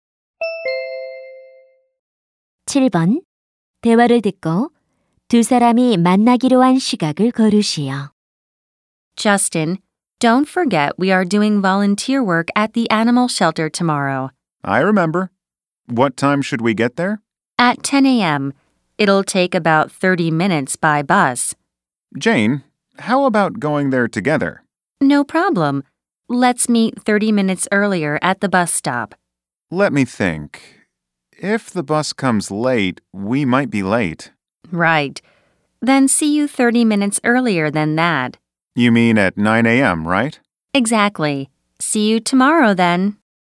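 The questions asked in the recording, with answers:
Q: 대화를 듣고 두 사람이 만나기로 한 시각을 고르시오.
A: 오전 9시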